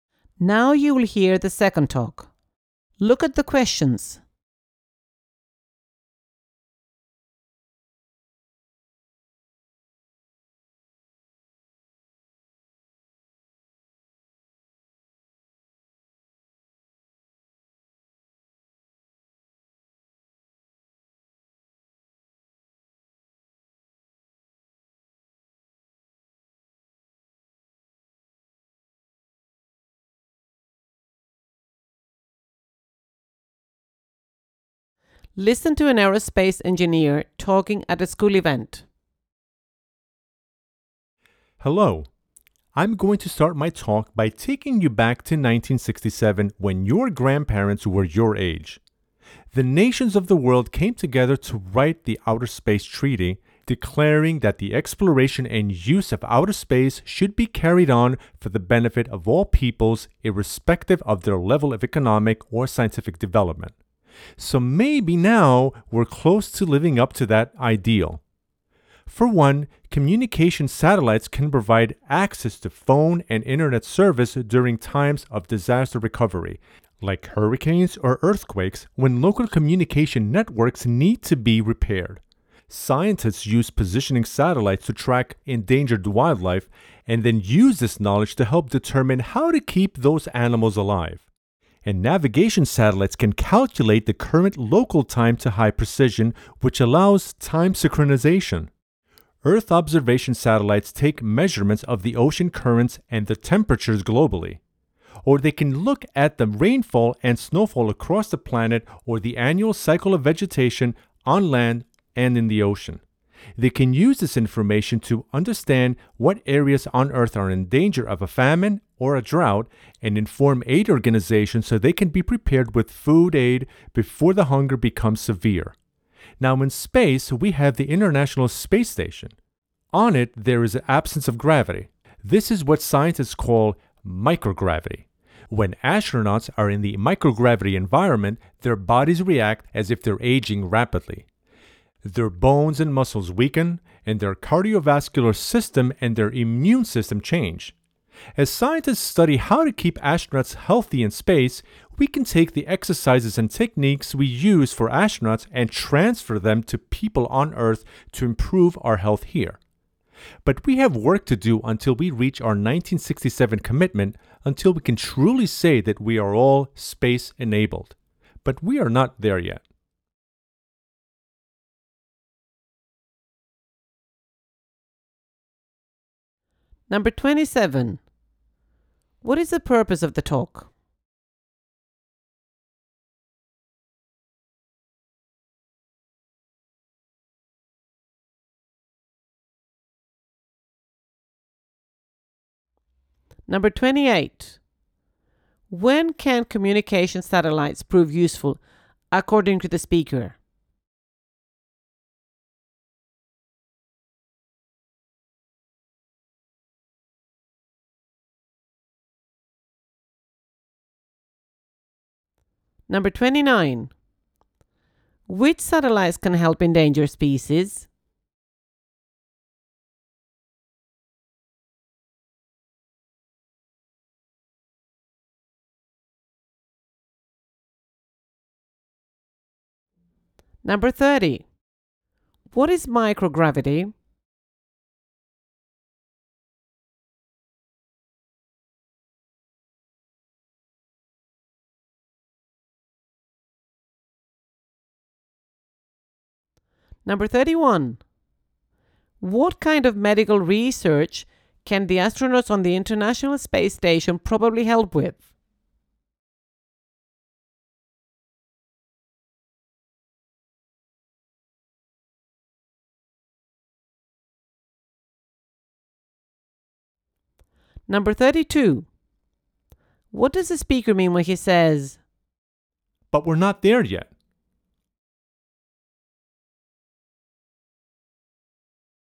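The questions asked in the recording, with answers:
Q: When can communication satellites prove useful, according to the speaker?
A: During disaster recovery, like after hurricanes or earthquakes

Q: Which satellites can help endangered species?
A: Positioning satellites

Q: What is microgravity?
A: An absence of gravity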